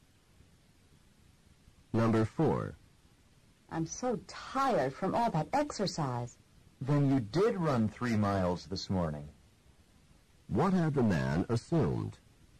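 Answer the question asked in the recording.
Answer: That the woman had not run 3 miles this morning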